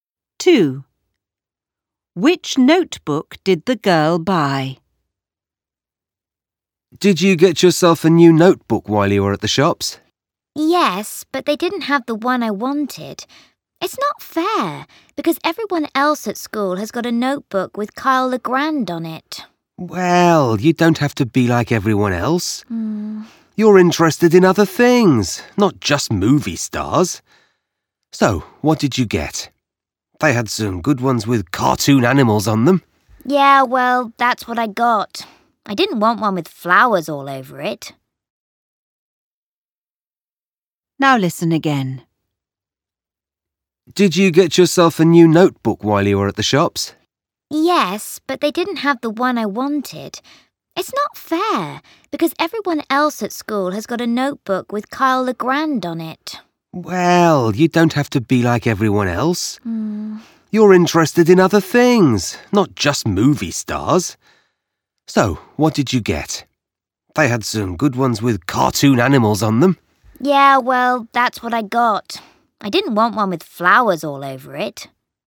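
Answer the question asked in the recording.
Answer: One with cartoon animals on it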